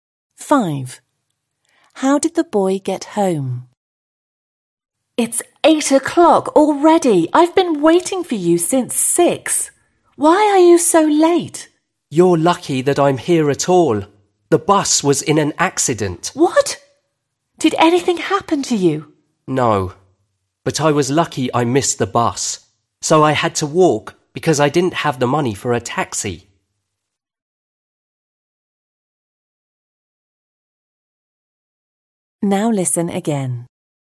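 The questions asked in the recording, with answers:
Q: How did the boy get home?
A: He walked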